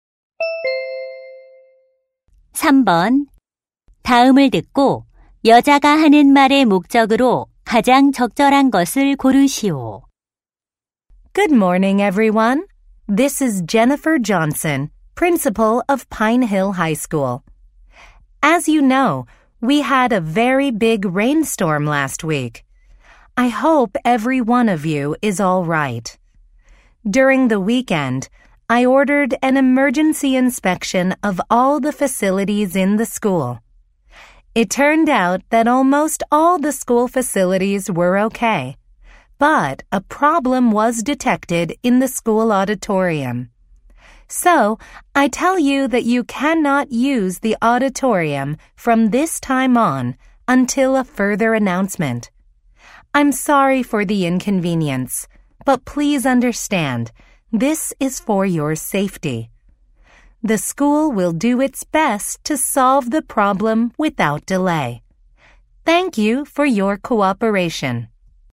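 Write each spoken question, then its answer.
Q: 다음을 듣고 여자가 하는 말의 목적으로 가장 적절한 것을 고르시오.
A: 안전 점검 결과 강당 사용 금지를 알리려고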